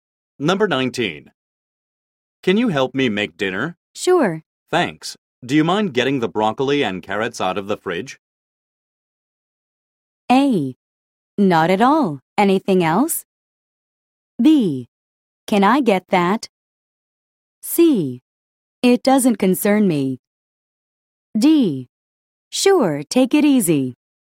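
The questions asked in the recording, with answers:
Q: Thanks. Do you mind getting the broccoli and carrots out of the fridge?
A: A: Not at all. Anything else?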